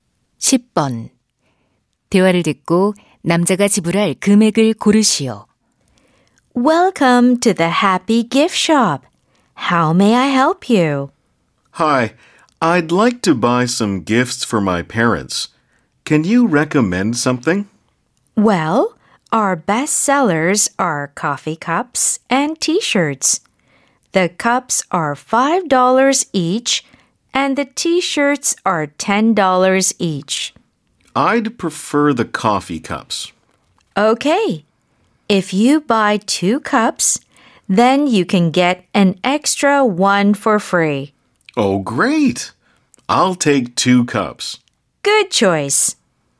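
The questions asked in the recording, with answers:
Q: 대화를 듣고 남자가 지불할 금액을 고르시오.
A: 10달러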